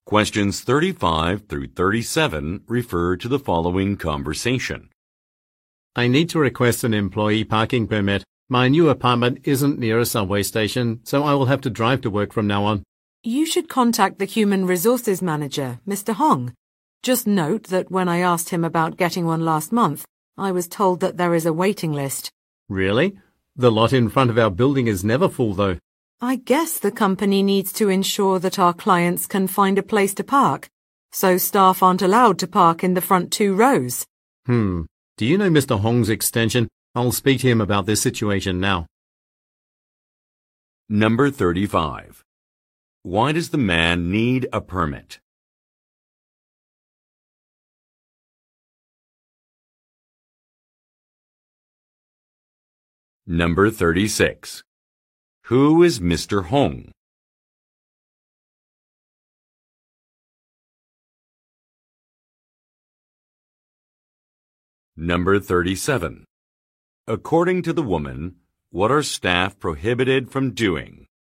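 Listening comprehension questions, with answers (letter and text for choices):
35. Why does the man need a permit?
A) He bought a car last month.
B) He was informed about a policy change.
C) He lives near a subway station.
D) He moved into a new residence.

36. Who is Mr. Hong?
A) A building manager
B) A department head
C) A corporate shareholder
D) A company president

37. According to the woman, what are staff prohibited from doing?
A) Taking unauthorized breaks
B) Parking in certain spots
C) Using a pass for multiple cars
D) Contacting clients directly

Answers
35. D) He moved into a new residence.
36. B) A department head
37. B) Parking in certain spots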